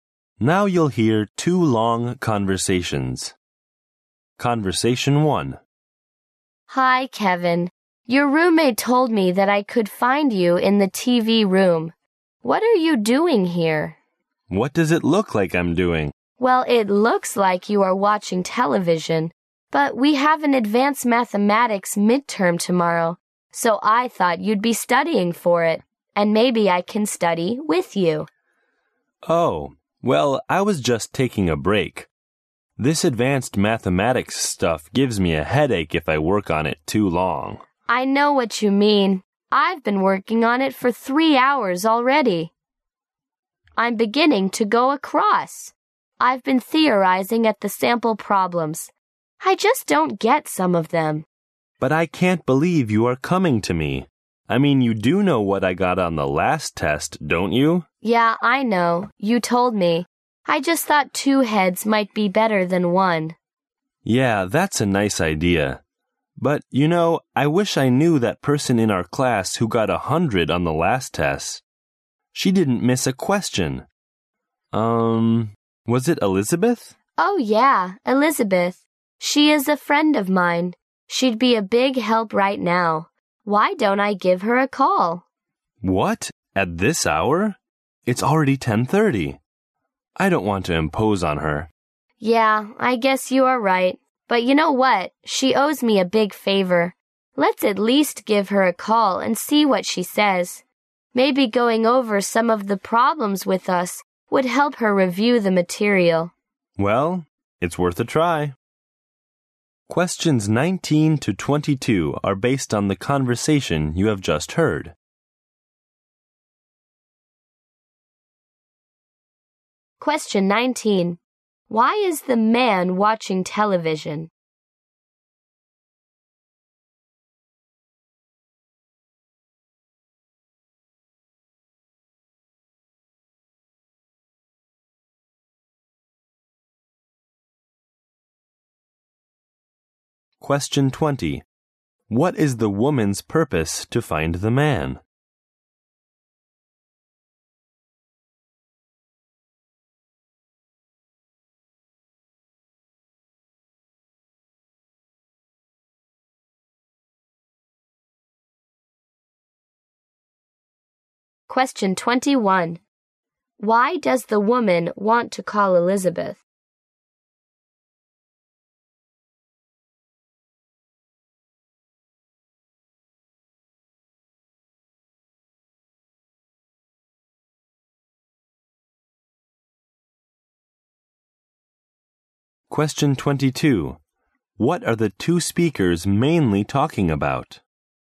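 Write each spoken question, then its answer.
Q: Why is the man watching television?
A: He is taking a break from studying advanced mathematics.

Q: What is the woman's purpose to find the man?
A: To study with him for the maths midterm.

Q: Why does the woman want to call Elizabeth?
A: Elizabeth got 100 on the last test and could help them.

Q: What are the two speakers mainly talking about?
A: Preparing for the advanced mathematics midterm.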